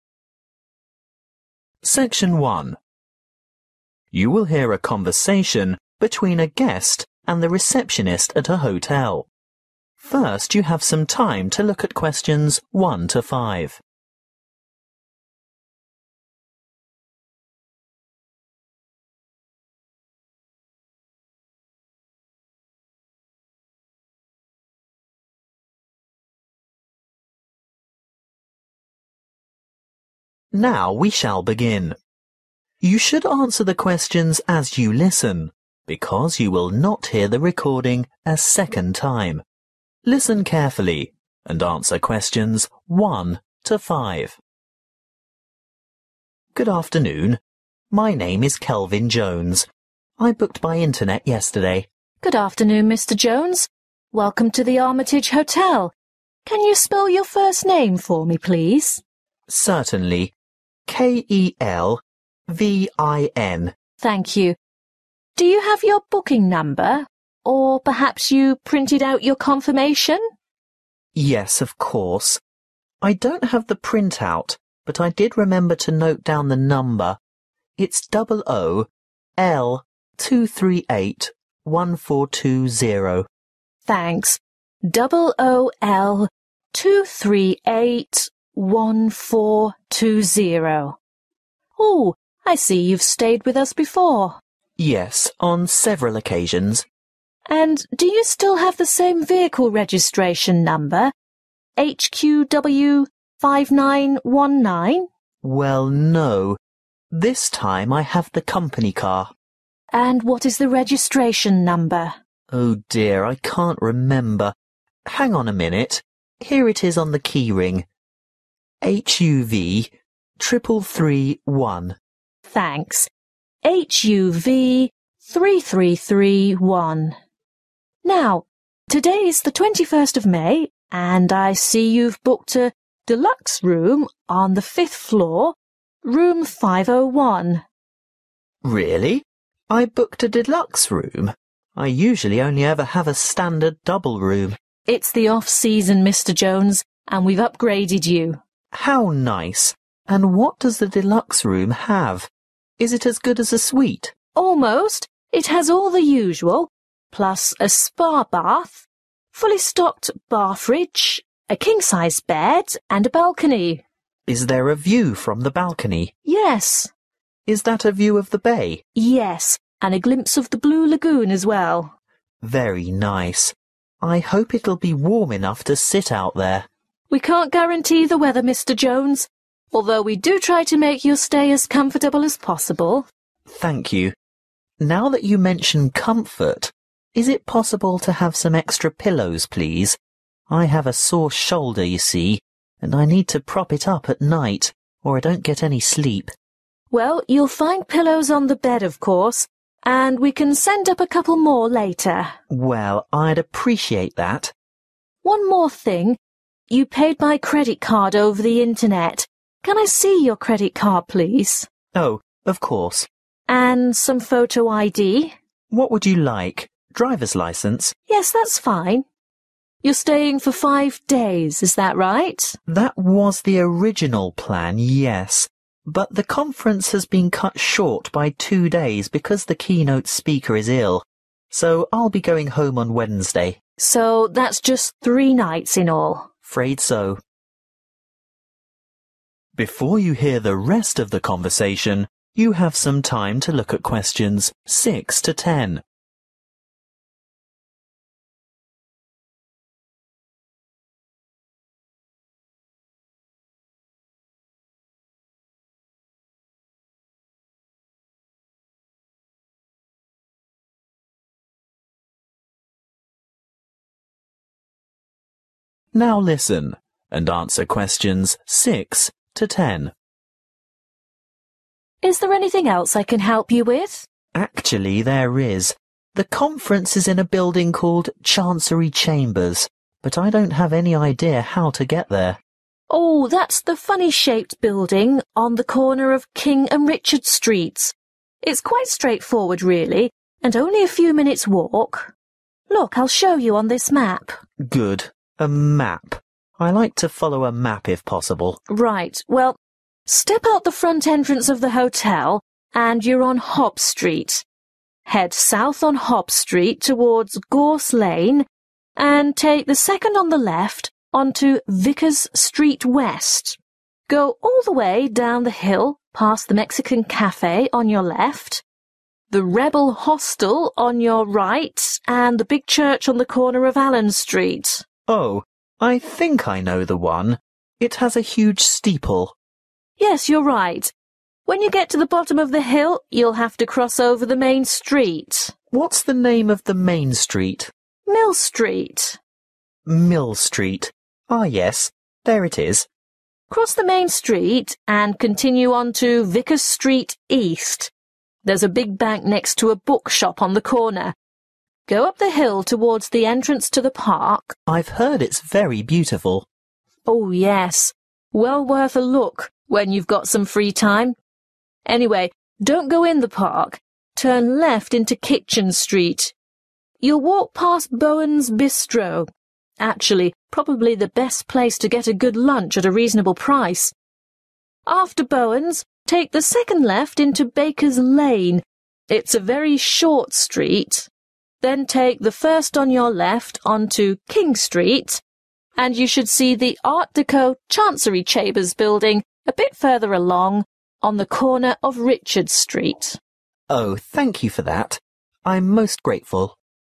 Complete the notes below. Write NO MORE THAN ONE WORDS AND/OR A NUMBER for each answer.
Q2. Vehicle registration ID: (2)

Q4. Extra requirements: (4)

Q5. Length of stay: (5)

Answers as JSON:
{"2": "HUV 3331", "4": "(2) pillows", "5": "three nights"}